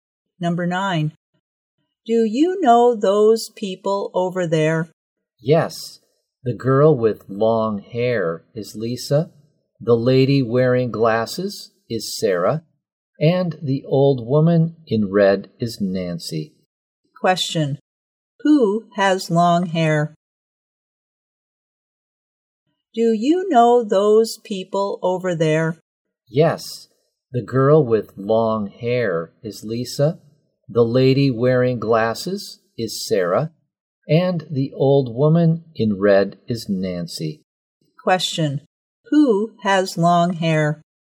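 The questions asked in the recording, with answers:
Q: Question. Who has long hair?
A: Lisa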